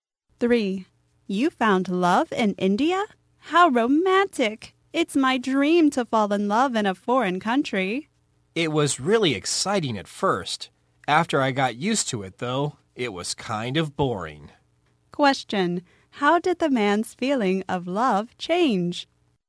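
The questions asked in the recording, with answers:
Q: How did the man's feeling of love change?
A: It was exciting at first but became boring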